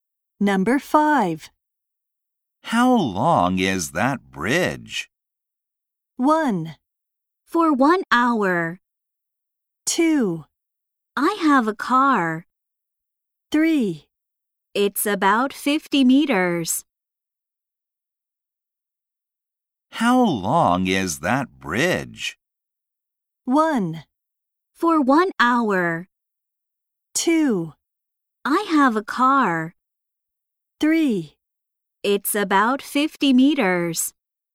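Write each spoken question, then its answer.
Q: How long is that bridge?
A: 3: It's about 50 meters.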